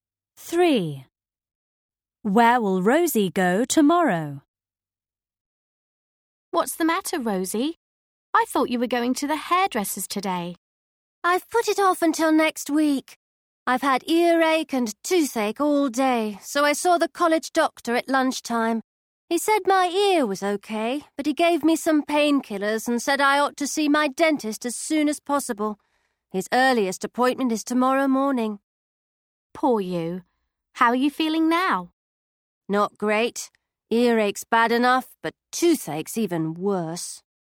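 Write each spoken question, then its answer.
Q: Where will Rosie go tomorrow?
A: To the dentist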